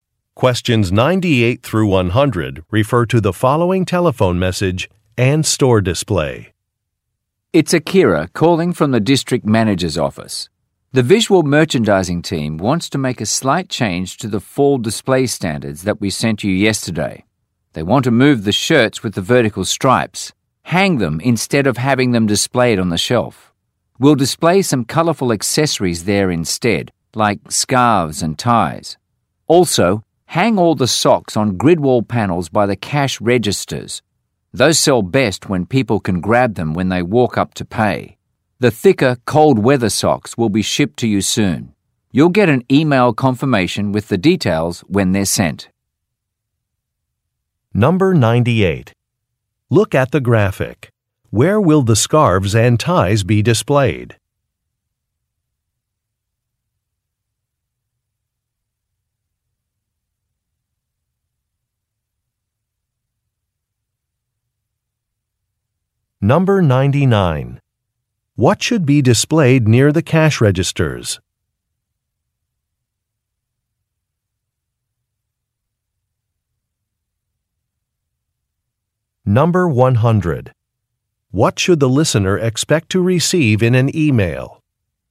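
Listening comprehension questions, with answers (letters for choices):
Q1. What should be displayed near the cash registers?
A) Coupons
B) Hats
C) Gloves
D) Socks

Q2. What should the listener expect to receive in an e-mail?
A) A payment schedule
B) Photographs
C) Shipping information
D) Display measurements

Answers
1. D
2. C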